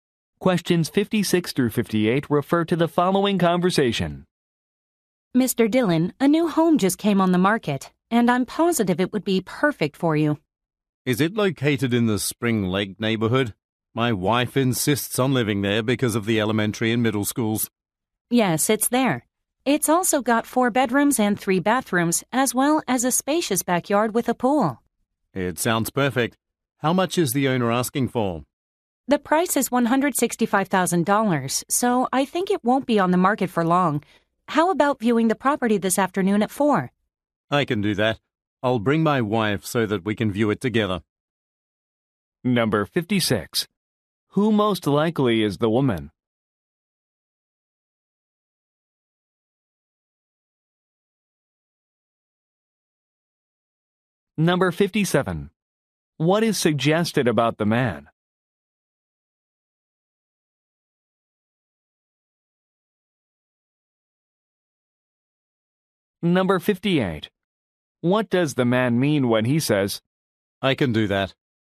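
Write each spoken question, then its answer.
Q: Who most likely is the woman?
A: A real estate agent

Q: What does the man mean when he says,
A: He can view the property at 4 this afternoon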